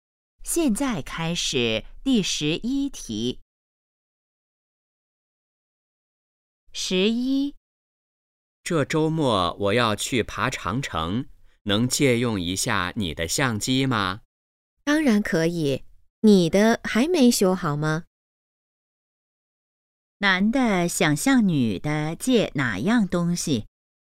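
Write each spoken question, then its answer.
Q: 男的想向女的借哪样东西?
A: 相机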